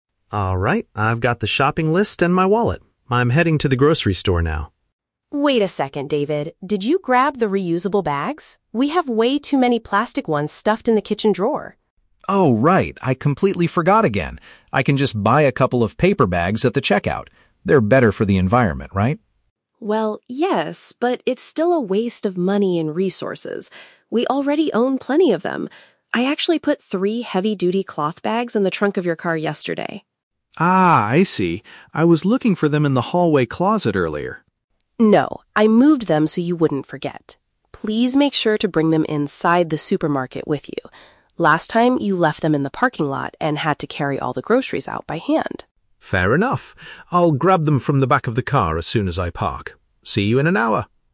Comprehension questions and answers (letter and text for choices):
Listen to the conversation between a husband and wife, then choose the correct answer (A, B, or C) for each question.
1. What did the man suggest doing when he realized he forgot the bags?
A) Taking some plastic ones from the kitchen.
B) Paying for paper ones at the store.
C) Returning home immediately to get them.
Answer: B) Paying for paper ones at the store.

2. Where are the reusable bags currently located?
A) Inside the vehicle.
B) In the hallway closet.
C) On the kitchen counter.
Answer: A) Inside the vehicle.

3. What mistake did the man make during his previous shopping trip?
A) He bought the wrong items on the shopping list.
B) He dropped his groceries in the parking lot.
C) He left his bags in the car.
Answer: C) He left his bags in the car.

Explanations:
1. David says, "I can just buy a couple of paper bags at the checkout." Option (B) uses synonyms ("paying for" instead of "buy", "at the store" instead of "at the checkout"). Option (A) is a trap; Sarah mentions the "kitchen drawer," but that is where they have too many plastic bags, not what David suggests taking. Option (C) is plausible but never mentioned.
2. Sarah says she put the bags "in the trunk of your car". Later David says he will grab them from the "back of the car". Option (A) uses the synonym "vehicle" for "car". Option (B) is a trap; David says he "was looking for them in the hallway closet," but they are not there anymore. Option (C) is not mentioned.
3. Sarah reminds him: "Last time, you left them in the parking lot and had to carry all the groceries out by hand." (Leaving them in the car at the parking lot). Option (A) is a trap; the "shopping list" is mentioned at the very beginning of the audio, but it wasn't his mistake. Option (B) is a trap; he had to "carry all the groceries out by hand", but he didn't drop them.

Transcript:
David: Alright, I've got the shopping list and my wallet. I'm heading to the grocery store now.
Sarah: Wait a second, David! Did you grab the reusable bags? We have way too many plastic ones stuffed in the kitchen drawer.
David: Oh, right. I completely forgot again. I can just buy a couple of paper bags at the checkout. They're better for the environment, right?
Sarah: Well, yes, but it's still a waste of money and resources. We already own plenty of them. I actually put three heavy-duty cloth bags in the trunk of your car yesterday.
David: Ah, I see. I was looking for them in the hallway closet earlier.
Sarah: No, I moved them so you wouldn't forget. Please make sure to bring them inside the supermarket with you. Last time, you left them in the parking lot and had to carry all the groceries out by hand.
David: Fair enough! I'll grab them from the back of the car as soon as I park. See you in an hour!